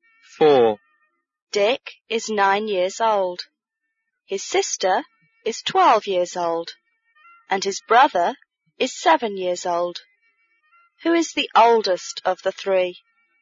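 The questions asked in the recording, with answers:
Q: Who is the oldest of the three?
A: His sister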